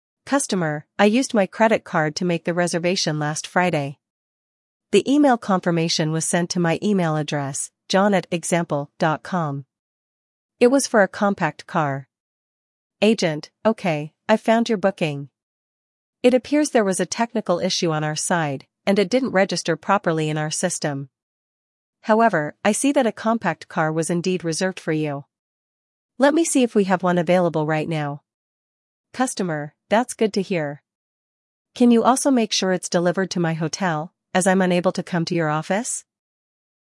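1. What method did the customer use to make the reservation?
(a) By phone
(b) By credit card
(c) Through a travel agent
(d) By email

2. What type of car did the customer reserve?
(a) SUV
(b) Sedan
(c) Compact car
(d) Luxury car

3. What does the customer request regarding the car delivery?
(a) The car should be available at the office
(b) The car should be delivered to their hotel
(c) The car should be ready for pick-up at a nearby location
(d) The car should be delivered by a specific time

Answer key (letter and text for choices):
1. (b) By credit card
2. (c) Compact car
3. (b) The car should be delivered to their hotel

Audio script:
Customer: "I used my credit card to make the reservation last Friday. The email confirmation was sent to my email address, john@example.com. It was for a compact car."
Agent: "Okay, I've found your booking. It appears there was a technical issue on our side, and it didn't register properly in our system. 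However, I see that a compact car was indeed reserved for you. Let me see if we have one available right now."
Customer: "That's good to hear. Can you also make sure it's delivered to my hotel, as I'm unable to come to your office?"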